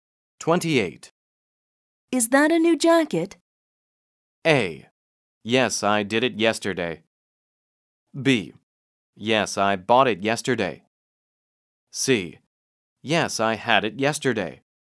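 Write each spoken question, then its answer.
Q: Is that a new jacket?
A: B: Yes, I bought it yesterday.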